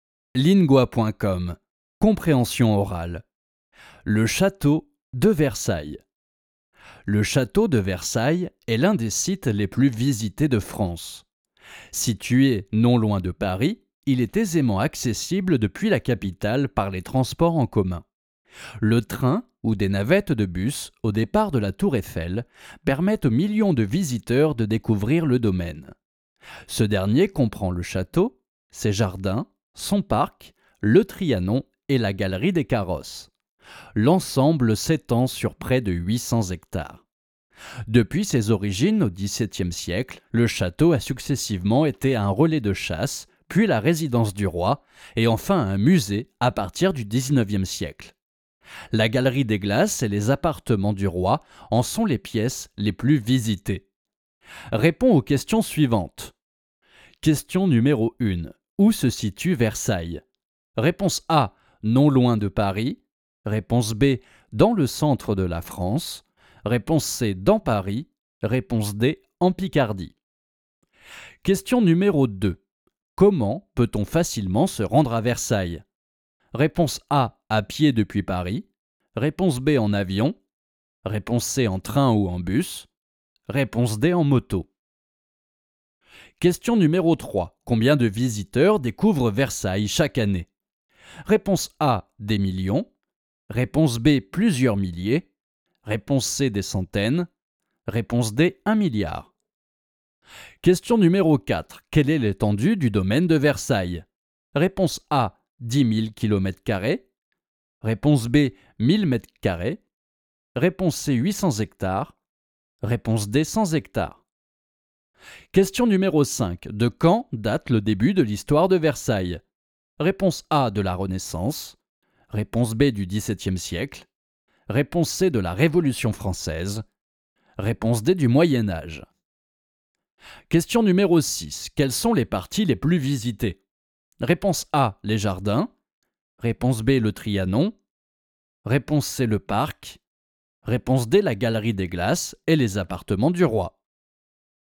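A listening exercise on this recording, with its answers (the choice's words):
Dann beantworte die folgenden Fragen zum Text:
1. Où se situe Versailles ?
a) non loin de Paris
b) dans le centre de la France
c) dans Paris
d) en Picardie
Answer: non loin de Paris

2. Comment peut-on facilement se rendre à Versailles ?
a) à pied depuis Paris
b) en avion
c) en train ou en bus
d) en moto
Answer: en train ou en bus

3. Combien de visiteurs découvrent Versailles chaque année ?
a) des millions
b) plusieurs milliers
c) des centaines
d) un milliard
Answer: des millions

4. Quelle est l'étendue du domaine de Versailles ?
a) 10 000 km2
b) 1000 m2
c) 800 hectares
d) 100 hectares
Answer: 800 hectares

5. De quand date le début de l'histoire de Versailles ?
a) de la Renaissance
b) du 17° siècle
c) de la Révolution Française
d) du moyen-âge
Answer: du 17° siècle

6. Quelles sont les parties les plus visitées ?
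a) les jardins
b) le Trianon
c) le parc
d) la galerie des Glaces et les appartements du roi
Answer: la galerie des Glaces et les appartements du roi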